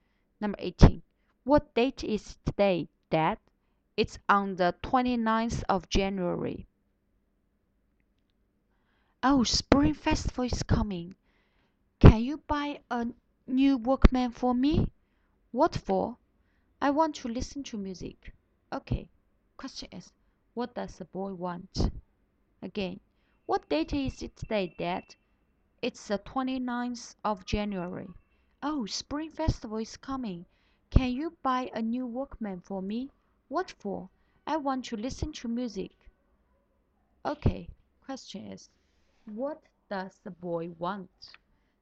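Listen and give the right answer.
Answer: A new Walkman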